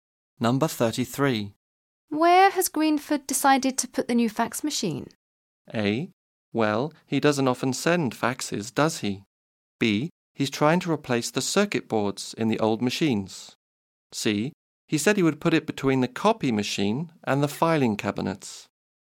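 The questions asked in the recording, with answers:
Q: Where has Greenford decided to put the new fax machine?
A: C: He said he would put it between the copy machine and the filing cabinets.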